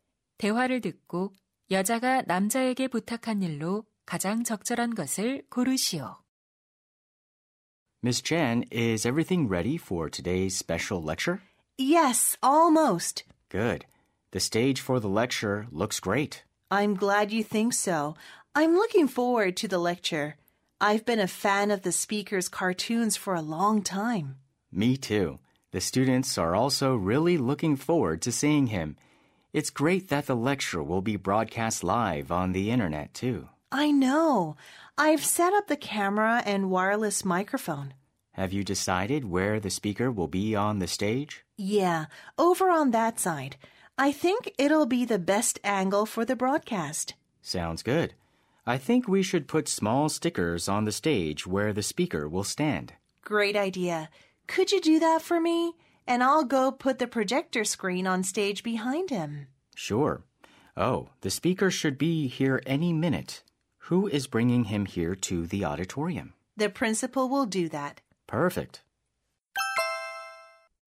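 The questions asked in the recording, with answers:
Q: 대화를 듣고 여자가 남자에게 부탁한 일로 가장 적절한 것을 고르시오.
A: 연사가 설 무대 위치에 작은 스티커 붙이기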